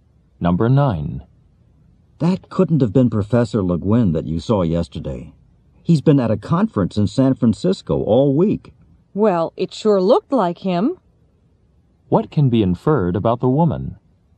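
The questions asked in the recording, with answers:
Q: What can be inferred about the woman?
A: She saw someone who looked like Professor Le Guin.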